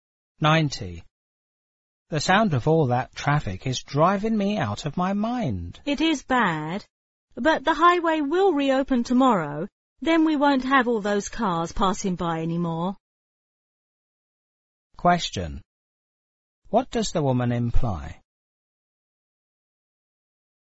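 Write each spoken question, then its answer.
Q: What does the woman imply?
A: The traffic noise is only temporary and will stop when the highway reopens tomorrow.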